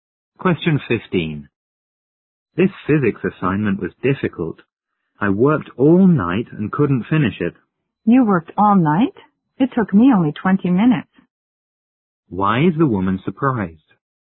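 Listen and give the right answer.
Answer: The assignment took her only 20 minutes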